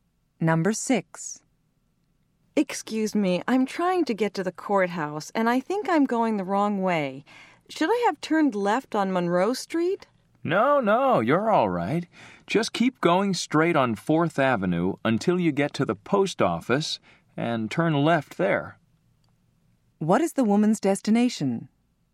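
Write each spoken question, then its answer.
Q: What is the woman's destination?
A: The courthouse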